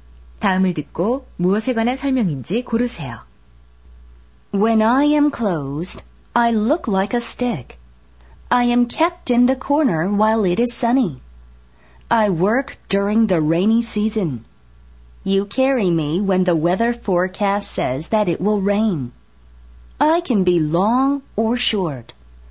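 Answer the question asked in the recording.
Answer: 우산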